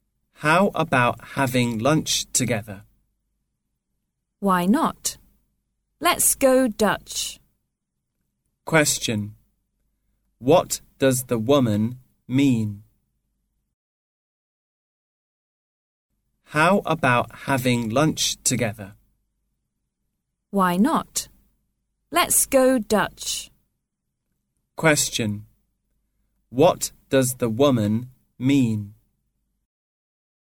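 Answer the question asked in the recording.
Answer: She agrees to have lunch and wants each to pay for themselves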